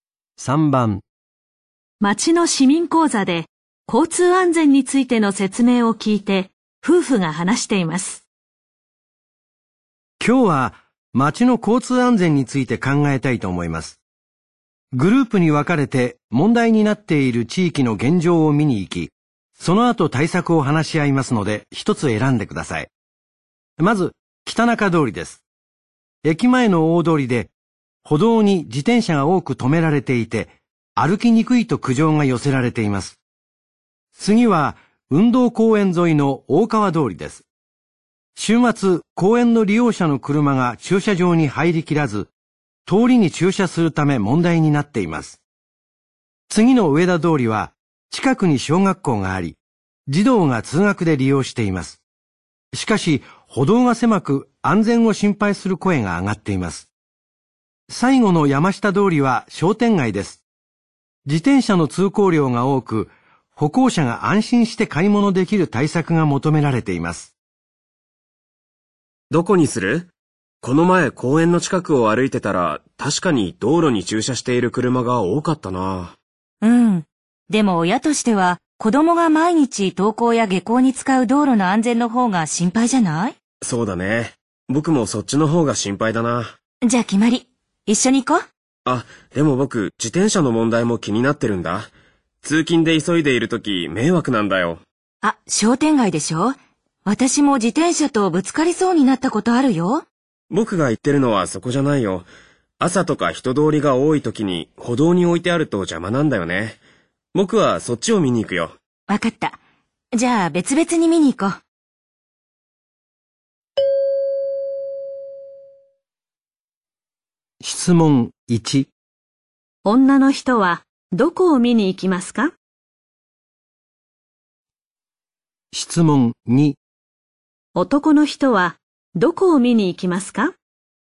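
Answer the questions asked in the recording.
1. 上田通り
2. 北中通り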